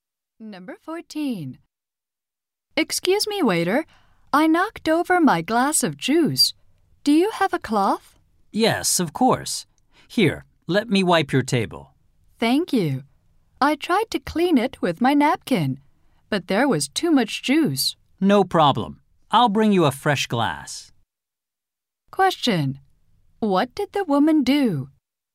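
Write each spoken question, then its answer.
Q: What did the woman do?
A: She knocked over her glass of juice.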